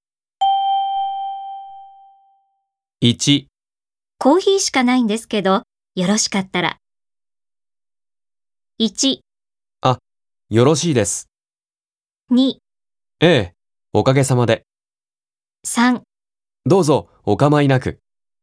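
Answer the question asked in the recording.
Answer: 3: どうぞ、お構いなく。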